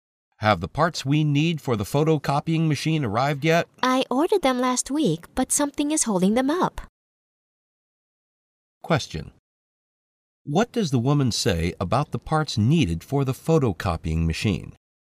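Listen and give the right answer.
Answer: They haven't arrived yet; something has delayed them.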